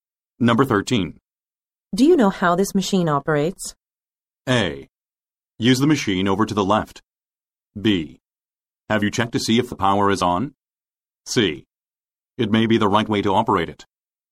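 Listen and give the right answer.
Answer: B: Have you checked to see if the power is on?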